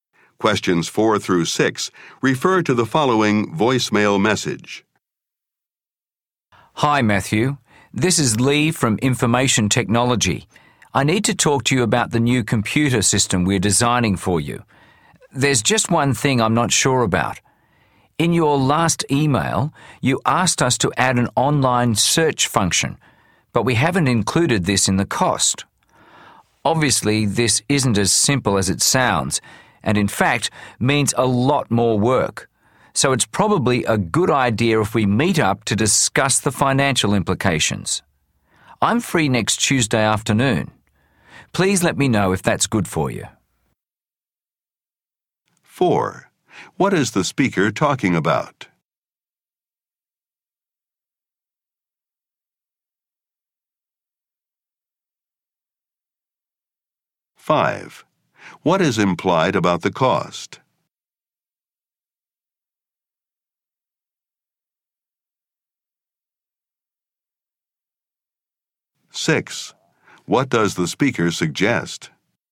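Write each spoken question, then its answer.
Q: What is the speaker talking about?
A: A new computer system being designed

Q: What is implied about the cost?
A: It will increase because of the added search function

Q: What does the speaker suggest?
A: Meeting to discuss the financial implications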